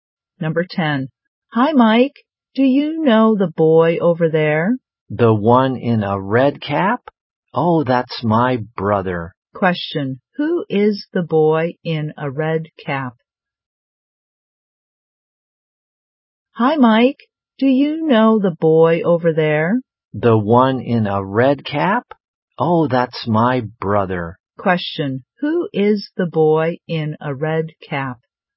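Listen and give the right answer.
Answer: Mike's brother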